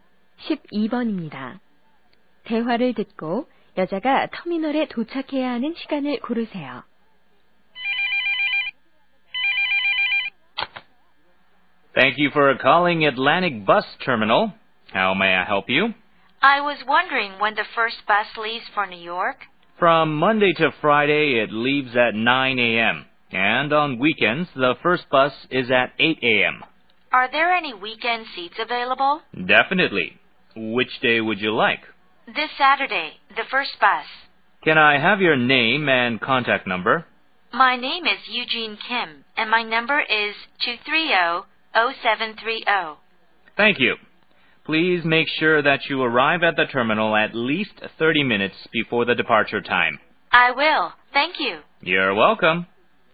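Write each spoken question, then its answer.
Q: 대화를 듣고 여자가 터미널에 도착해야 하는 시간을 고르세요.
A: 오전 7시 30분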